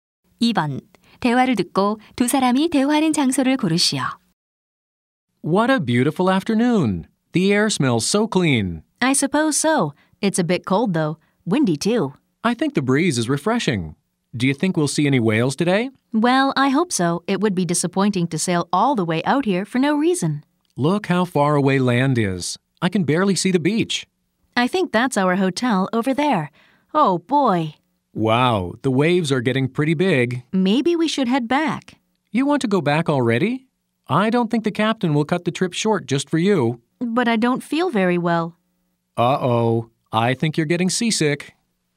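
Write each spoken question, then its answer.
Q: 대화를 듣고 두 사람이 대화하는 장소를 고르시오.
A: 배 위 (고래 관광선)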